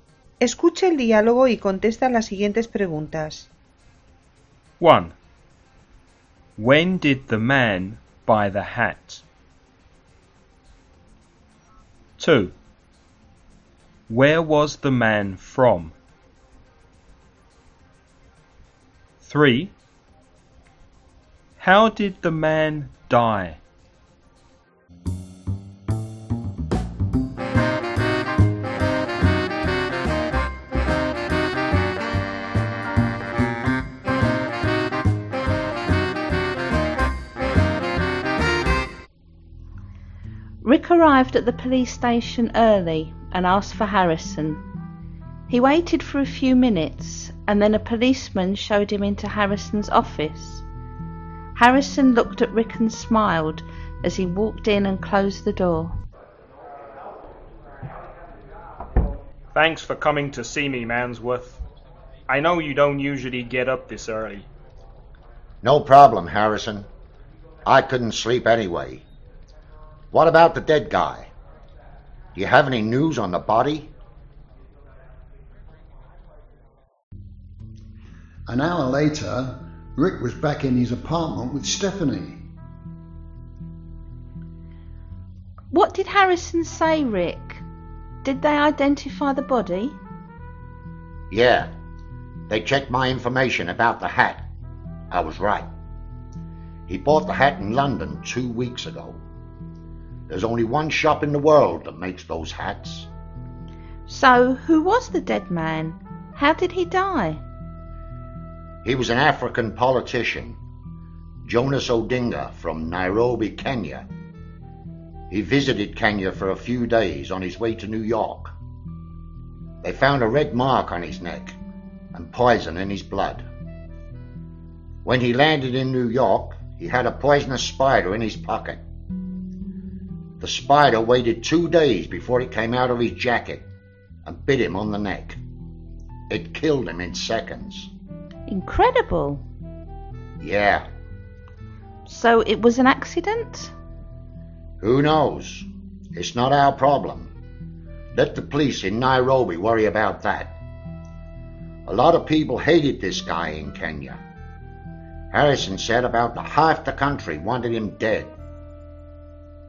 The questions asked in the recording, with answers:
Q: When did the man buy the hat?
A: 2 weeks ago.

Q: Where was the man from?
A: He was from Nairobi, Kenya.

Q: How did the man die?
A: A poisonous spider bit him.